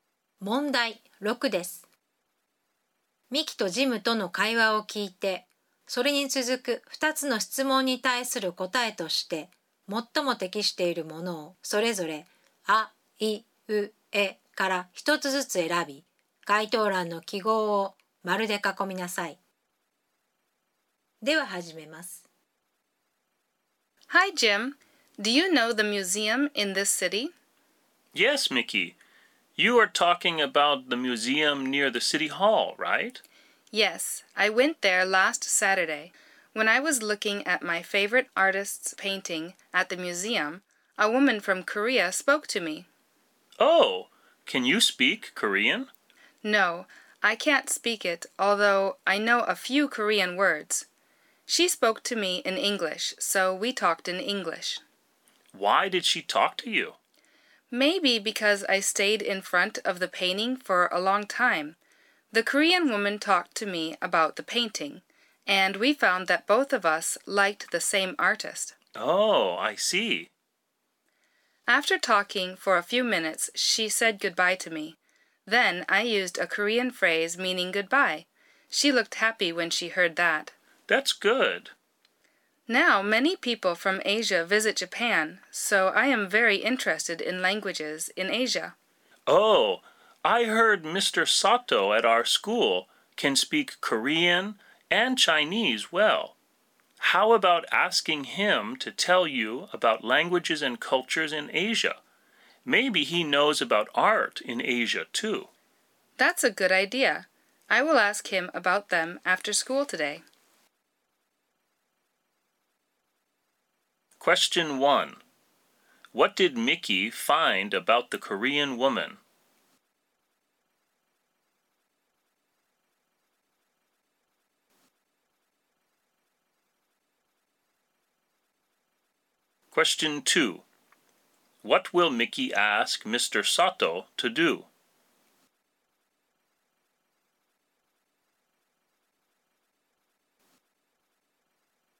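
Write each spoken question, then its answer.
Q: What did Mickey find about the Korean woman?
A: Both of them liked the same artist.

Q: What will Mickey ask Mr. Sato to do?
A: To tell her about languages and cultures in Asia.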